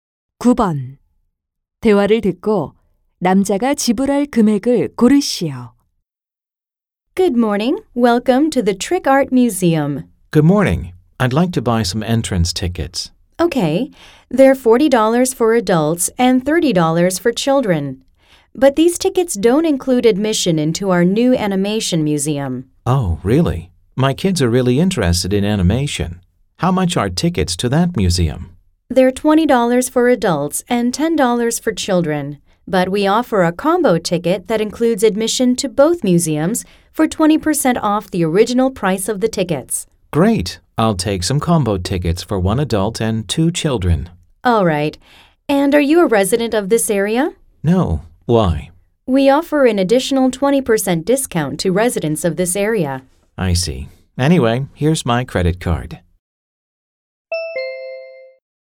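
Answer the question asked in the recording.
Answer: 112달러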